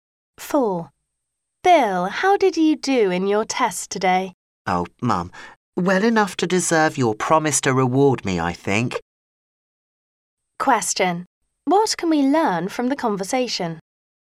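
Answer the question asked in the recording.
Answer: Bill did well in his test and his mother promised him a reward.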